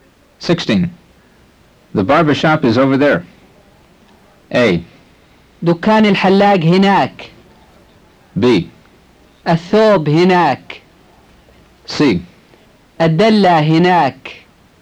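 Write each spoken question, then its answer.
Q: The barber shop is over there.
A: A: دكان الحلاق هناك.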